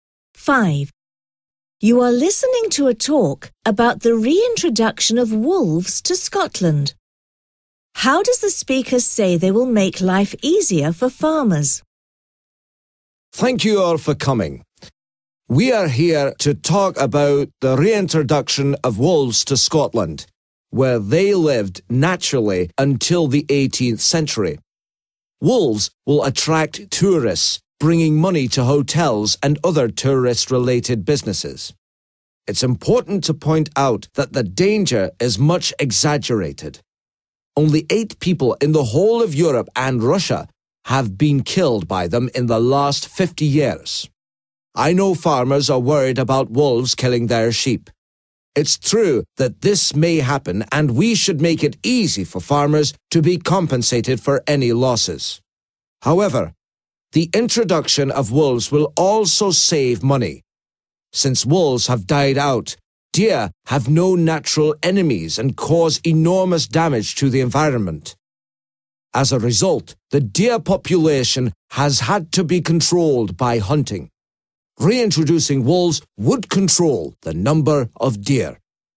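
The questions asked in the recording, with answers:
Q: How does the speaker say they will make life easier for farmers?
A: By making it easy for farmers to be compensated for any sheep killed by wolves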